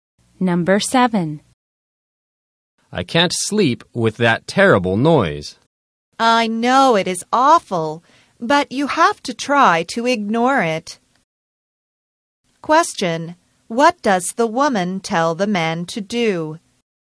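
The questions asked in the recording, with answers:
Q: What does the woman tell the man to do?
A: Try to ignore the noise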